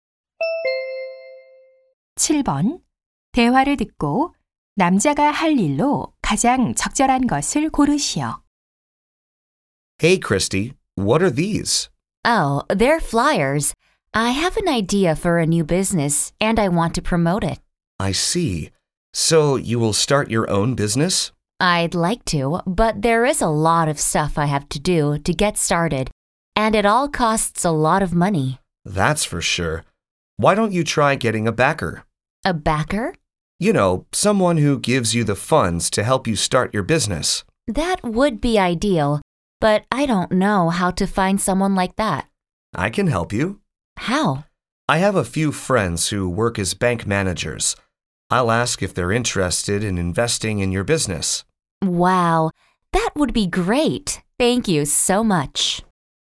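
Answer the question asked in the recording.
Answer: 은행 관리자인 친구들에게 투자 의향 물어보기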